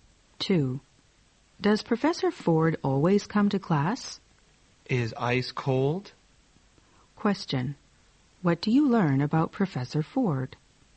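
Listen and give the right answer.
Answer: He always comes to class.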